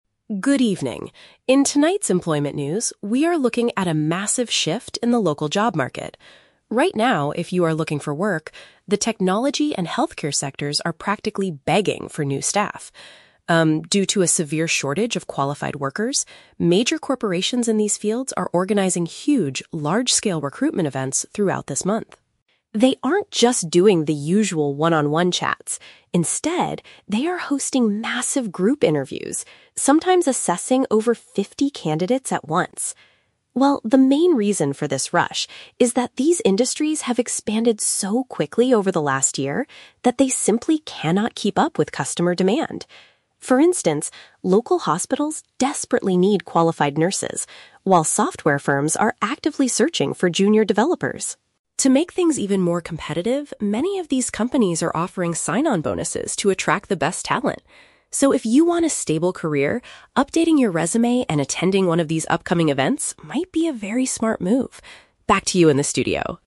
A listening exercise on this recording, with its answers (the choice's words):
Listen to a news reporter talking about the current job market. Choose the correct answer (A, B, or C) for each question.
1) What is the main reason for these large-scale recruitment events?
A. The companies are growing rapidly and lack enough staff.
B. The government is funding new job training programs.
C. The companies want to train fifty candidates at the same time.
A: The companies are growing rapidly and lack enough staff.

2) How are the companies changing their hiring process?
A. They prefer individual, face-to-face meetings with managers.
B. They are assessing many applicants at the same time.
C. They are conducting all of their interviews online.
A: They are assessing many applicants at the same time.

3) What extra benefit are some businesses providing to get good employees?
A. Free training courses for junior developers.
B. Longer vacation times for new staff.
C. Additional financial rewards for joining.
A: Additional financial rewards for joining.

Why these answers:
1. The speaker says the industries have "expanded so quickly" and there is a "severe shortage of qualified workers," which means they are growing rapidly and lack staff.
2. The speaker says they are "hosting massive group interviews" and assessing "over fifty candidates at once." This matches assessing many applicants at the same time.
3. The speaker mentions that companies are offering "sign-on bonuses" (money given to a new employee when they join). This is paraphrased as "additional financial rewards" in the correct answer.

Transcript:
Speaker: Good evening. In tonight's employment news, we are looking at a massive shift in the local job market. Right now, if you are looking for work, the technology and healthcare sectors are practically begging for new staff. Um, due to a severe shortage of qualified workers, major corporations in these fields are organizing huge, large-scale recruitment events throughout this month.
They aren't just doing the usual one-on-one chats. Instead, they are hosting massive group interviews, sometimes assessing over fifty candidates at once. Well, the main reason for this rush is that these industries have expanded so quickly over the last year that they simply cannot keep up with customer demand. For instance, local hospitals desperately need qualified nurses, while software firms are actively searching for junior developers.
To make things even more competitive, many of these companies are offering sign-on bonuses to attract the best talent. So, if you want a stable career, updating your resume and attending one of these upcoming events might be a very smart move. Back to you in the studio.